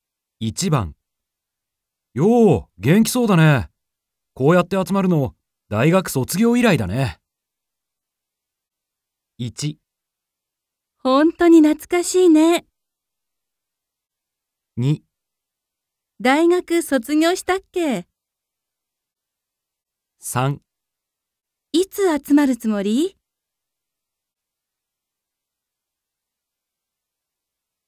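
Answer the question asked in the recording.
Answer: 1: 本当に懐かしいね。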